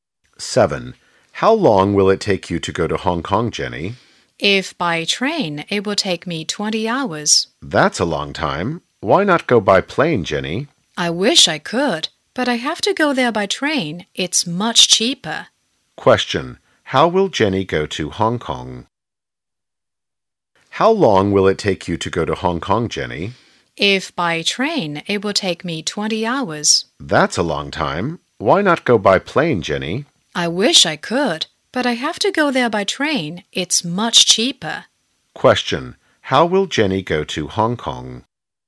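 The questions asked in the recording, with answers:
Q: How will Jenny go to Hong Kong?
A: By train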